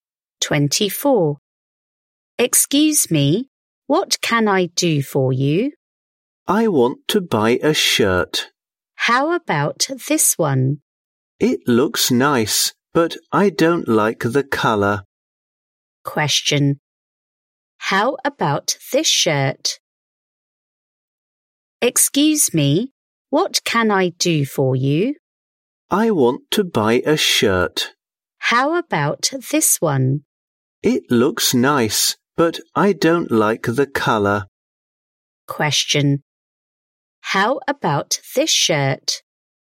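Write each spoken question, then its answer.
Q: Question. How about this shirt?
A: It looks nice, but the speaker doesn't like the colour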